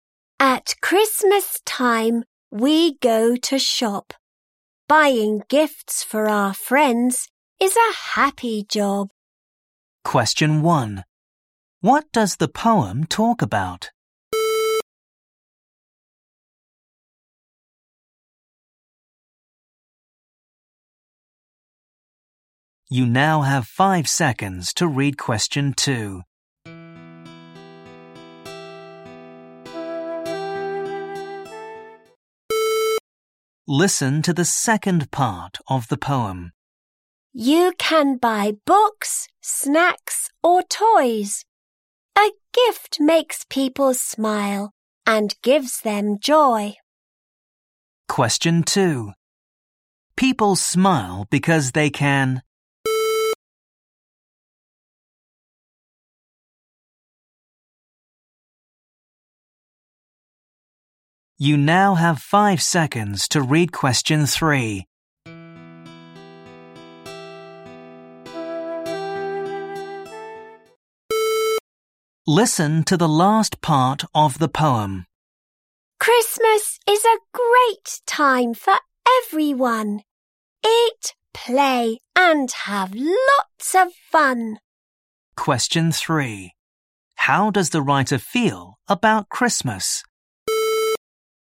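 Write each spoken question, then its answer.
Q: What does the poem talk about?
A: Shopping for Christmas gifts for friends

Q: How does the writer feel about Christmas?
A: It is a great, fun time (happy)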